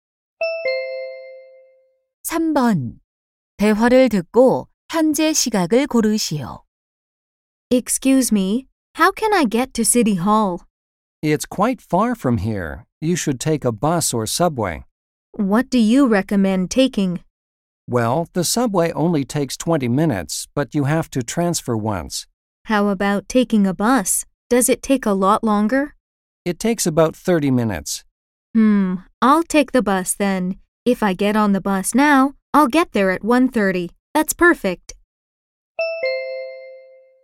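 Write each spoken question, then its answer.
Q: 대화를 듣고 현재 시각을 고르시오.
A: 1시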